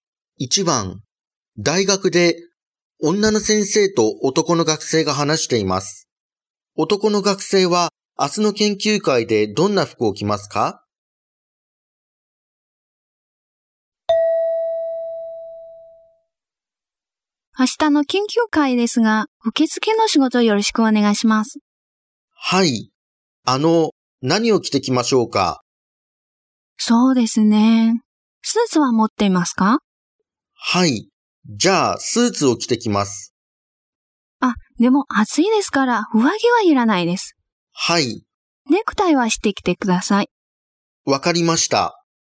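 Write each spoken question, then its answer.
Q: 男の学生は明日の研究会でどんな服を着ますか?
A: 上着なしのスーツにネクタイ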